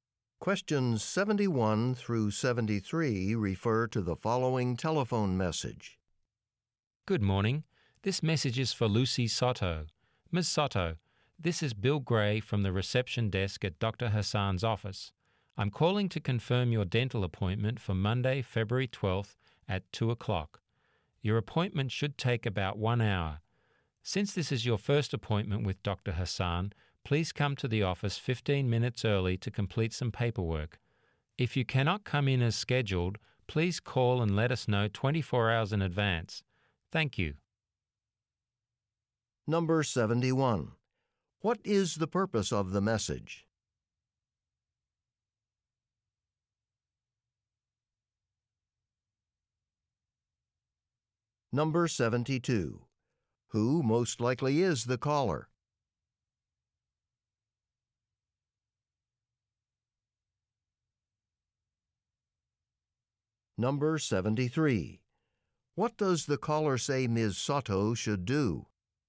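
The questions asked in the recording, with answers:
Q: What is the purpose of the message?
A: To confirm a dental appointment

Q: Who most likely is the caller?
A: A receptionist at a dentist's office

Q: What does the caller say Ms. Soto should do?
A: Come to the office 15 minutes early to complete paperwork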